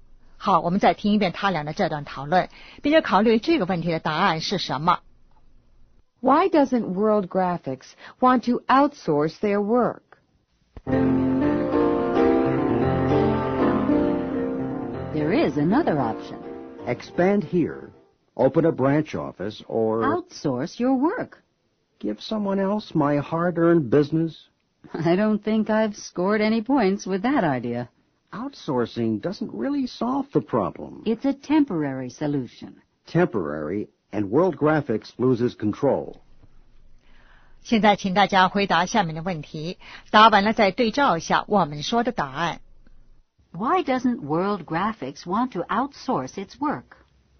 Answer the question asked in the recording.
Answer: It doesn't solve the problem. It's temporary. and World Graphics loses control.